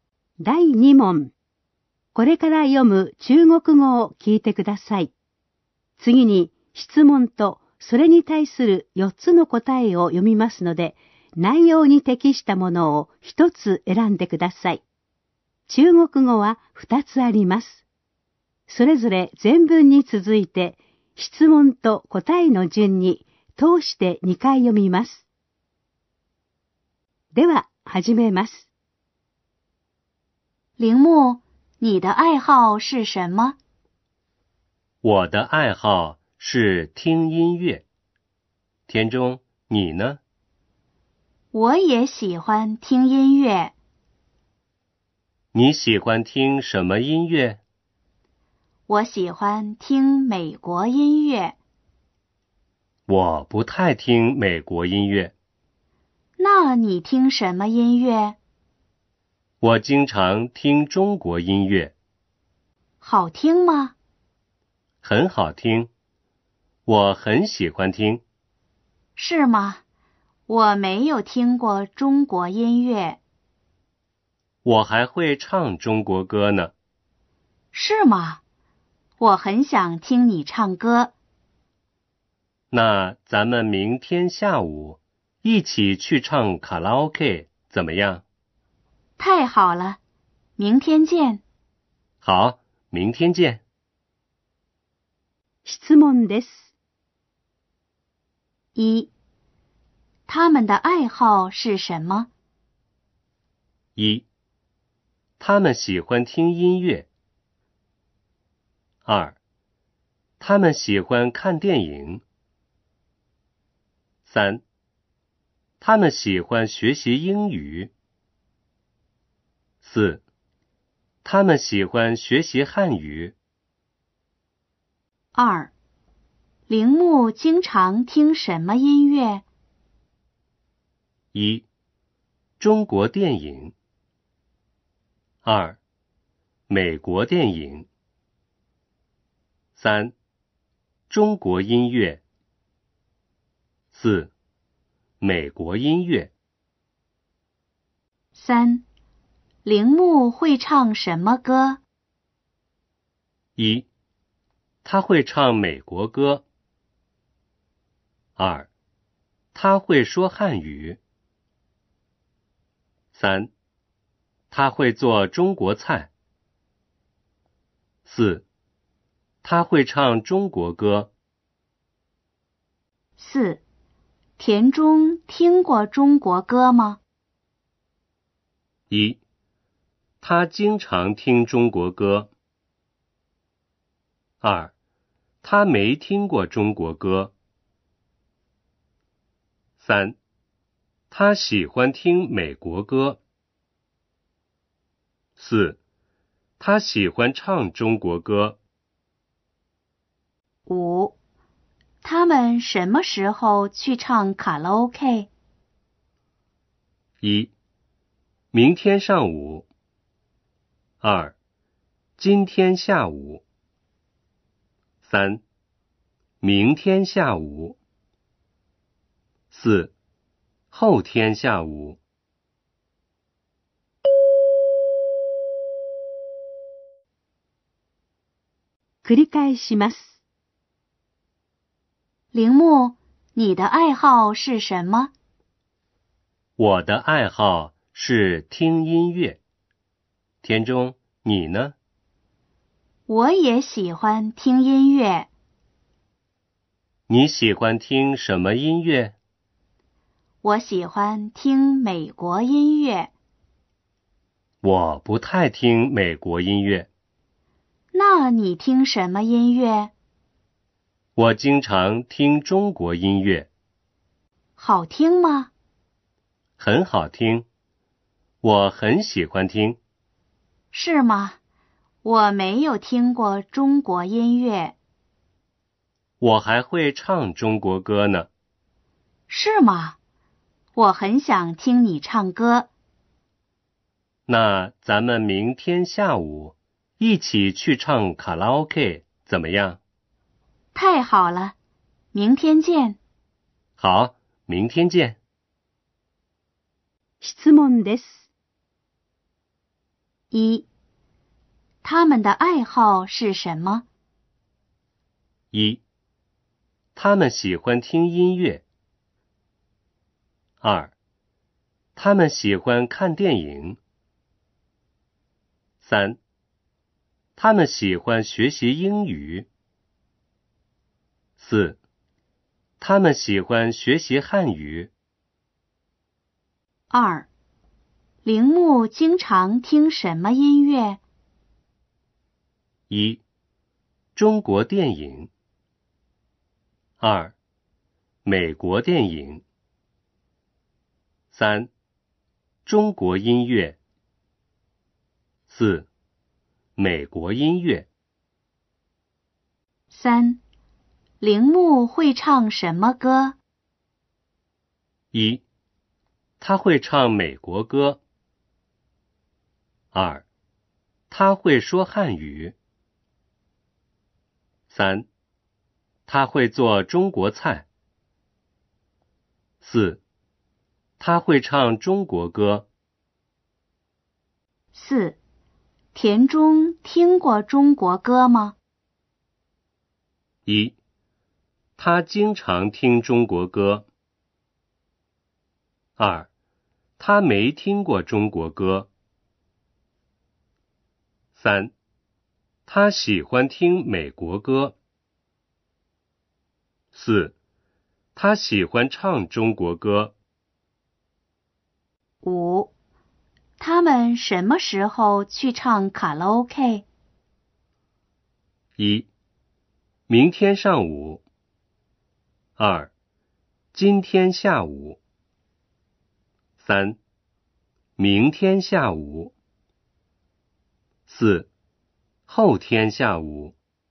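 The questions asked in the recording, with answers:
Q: 他们的爱好是什么?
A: 1: 他们喜欢听音乐。

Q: 铃木会唱什么歌?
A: 4: 他会唱中国歌。

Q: 他们什么时候去唱卡拉 OK?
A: 3: 明天下午。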